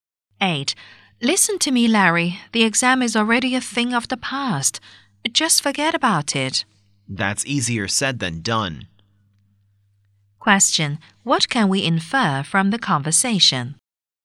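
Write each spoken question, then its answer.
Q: What can we infer from the conversation?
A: Larry finds it hard to forget about the exam.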